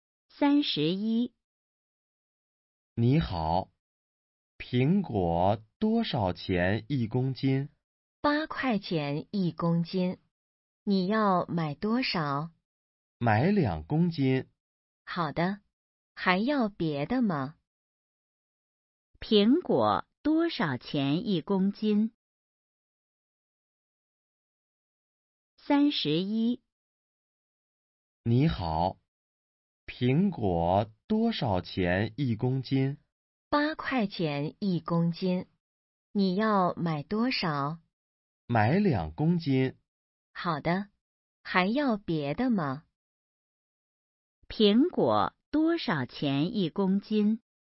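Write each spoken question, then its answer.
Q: 苹果多少钱一公斤?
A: 八块钱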